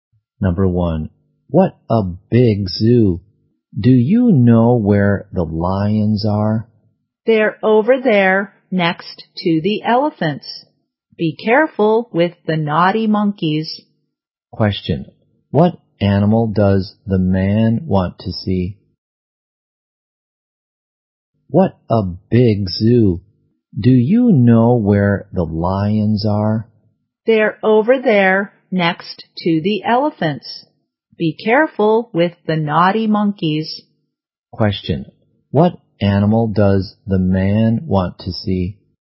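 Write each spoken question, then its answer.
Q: what animal does the man want to see?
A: Lions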